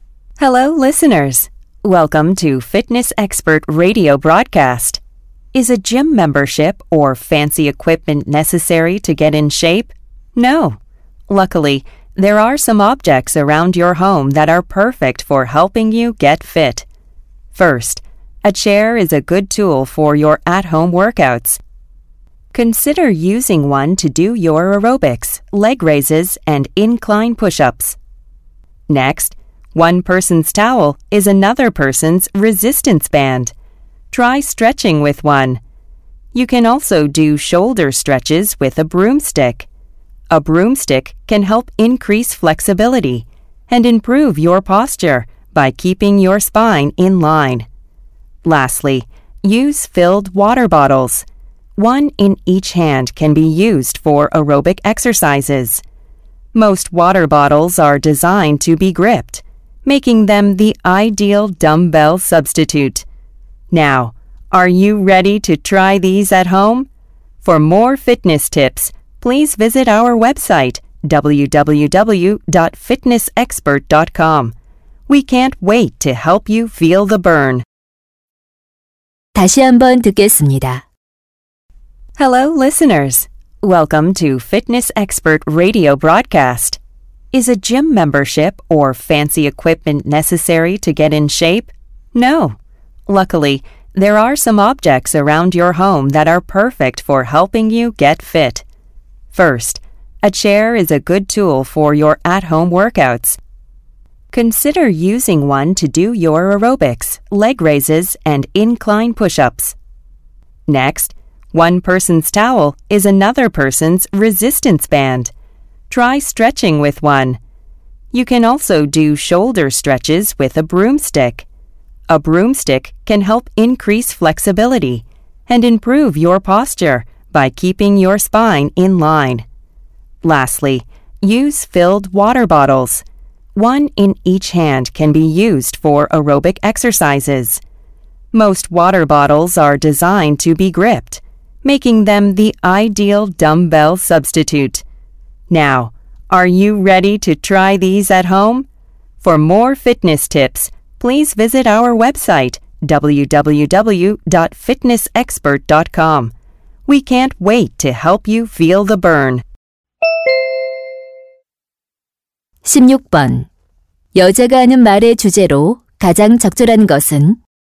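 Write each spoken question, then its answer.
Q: 여자가 하는 말의 주제로 가장 적절한 것은?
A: 집에 있는 물건을 운동 도구로 활용하는 방법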